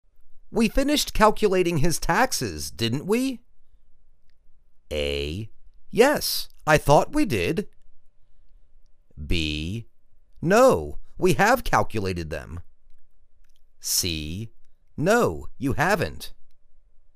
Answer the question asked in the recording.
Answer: Yes, I thought we did.